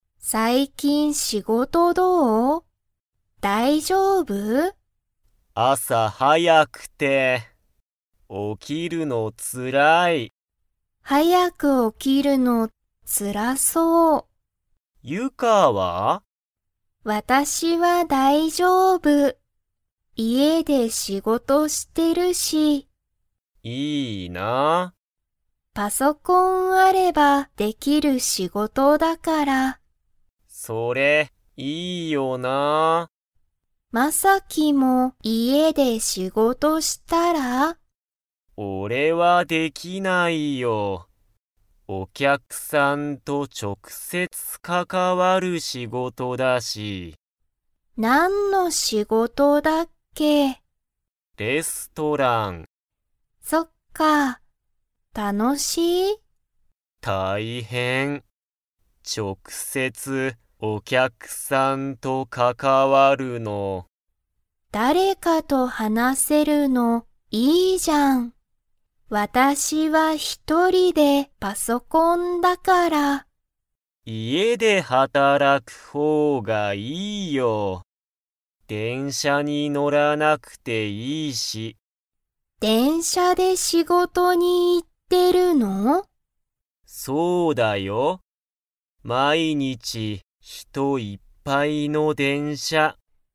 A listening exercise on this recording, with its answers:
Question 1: ユカはどこで仕事しごとしていますか?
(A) 学校がっこう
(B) 会社かいしゃ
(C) 家いえ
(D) レストラン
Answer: 家いえ

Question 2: マサキは、毎日まいにち電車でんしゃに 。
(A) 乗のってる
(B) 乗のらなくていい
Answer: 乗のってる

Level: Level 3

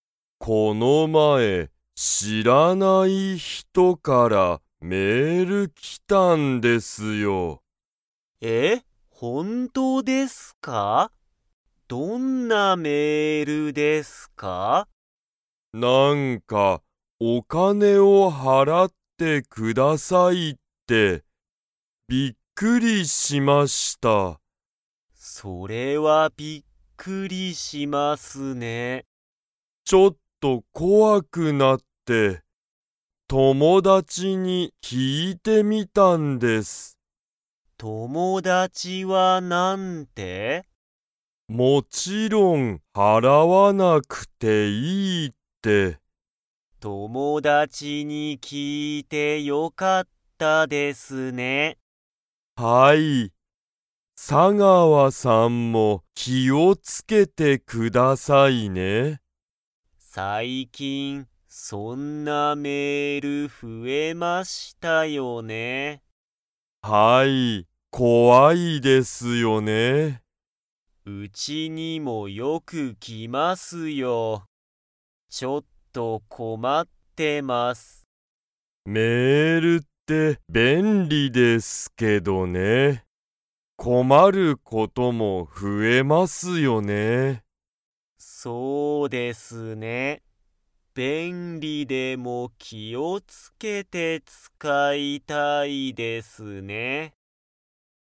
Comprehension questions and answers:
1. 山本やまもとさんに、誰だれからメールが来きましたか?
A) 佐川さがわさん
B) 夫おっと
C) 友達ともだち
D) 知しらない人ひと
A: 知しらない人ひと

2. 佐川さがわさんは、よくメールが来きて 。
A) 困こまってる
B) 困こまってない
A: 困こまってる

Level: Level 3

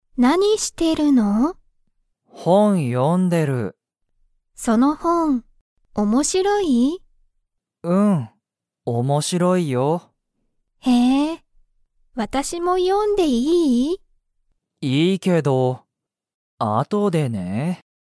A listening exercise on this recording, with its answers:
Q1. その本ほんは、____。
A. 面白おもしろい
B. すごい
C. かわいい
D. 楽たのしい(へや)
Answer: 面白おもしろい

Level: Level 1

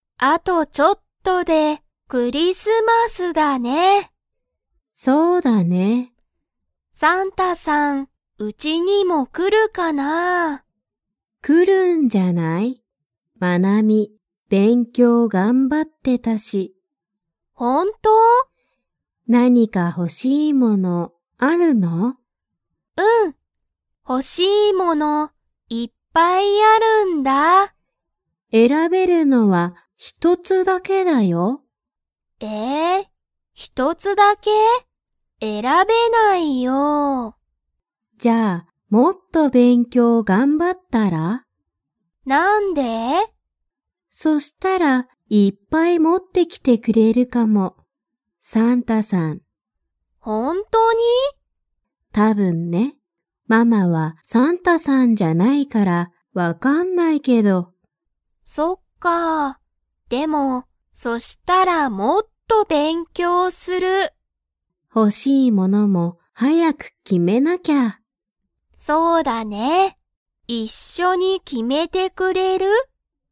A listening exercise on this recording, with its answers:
Comprehension Quiz (Skip if you don't understand the conversation yet)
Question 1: マナミは、____を頑張(がんば)っていた。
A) 勉強(べんきょう)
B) 仕事(しごと)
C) クリスマス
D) 家(いえ)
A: 勉強(べんきょう)

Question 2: もうマナミは、ほしいものを選えらびましたか?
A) はい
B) いいえ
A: いいえ

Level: Level 2

